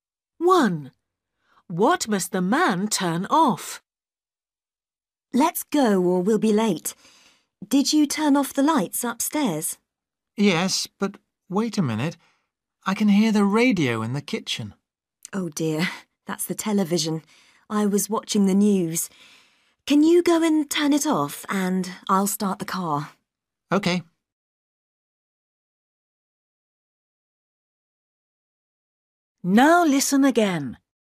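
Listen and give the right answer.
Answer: the television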